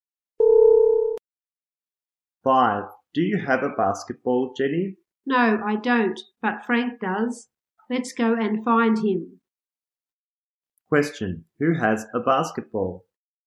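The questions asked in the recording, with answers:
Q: Who has a basketball?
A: Frank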